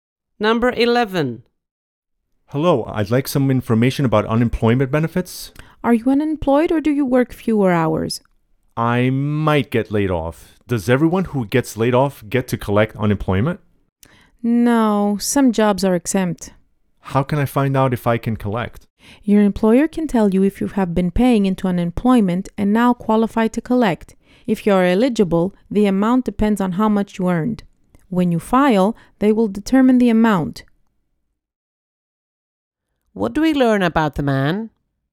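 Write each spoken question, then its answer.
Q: What do we learn about the man?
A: He might get laid off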